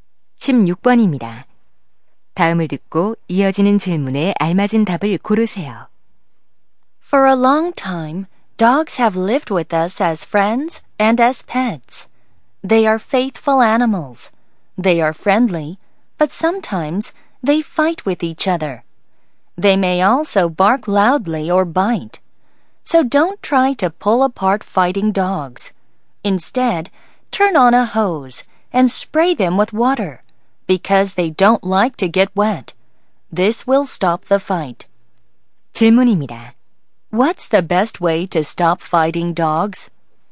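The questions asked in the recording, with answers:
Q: What's the best way to stop fighting dogs?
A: Spray them with water from a hose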